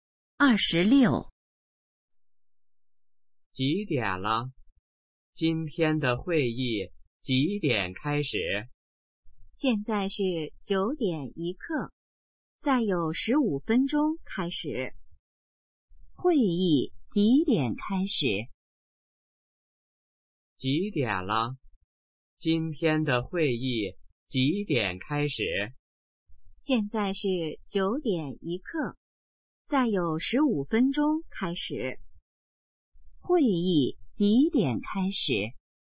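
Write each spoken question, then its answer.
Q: 会议几点开始?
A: 9:16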